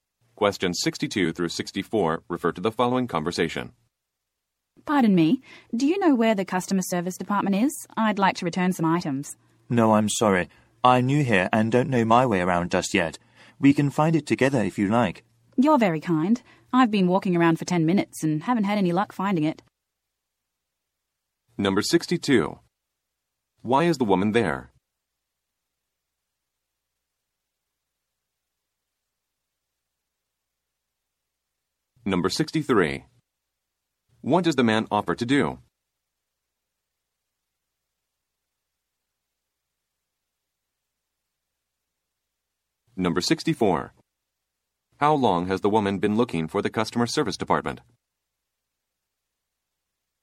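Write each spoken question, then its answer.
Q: Why is the woman there?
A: To return some items

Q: What does the man offer to do?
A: Help her find the customer service department

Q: How long has the woman been looking for the customer service department?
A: 10 minutes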